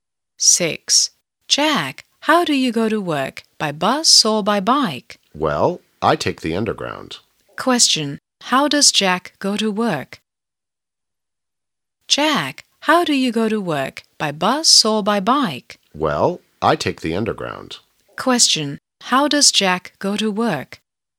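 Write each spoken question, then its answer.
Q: How does Jack go to work?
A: By underground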